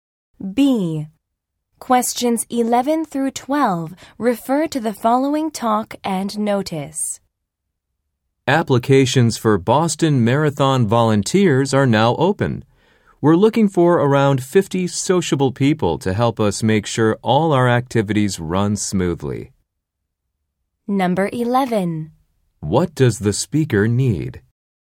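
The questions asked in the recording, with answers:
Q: What does the speaker need?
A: About 50 sociable volunteers for the Boston Marathon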